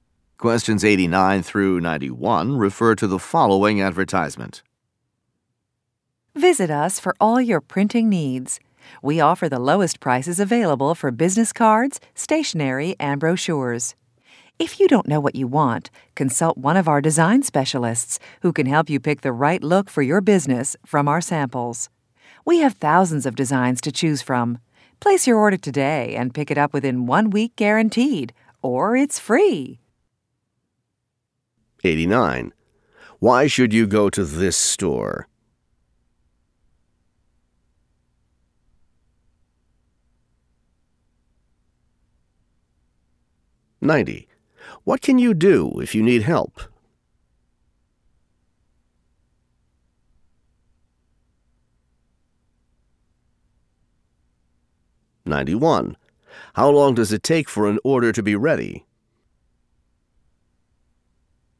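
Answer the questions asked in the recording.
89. It has the lowest prices
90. Consult a design specialist
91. Within 1 week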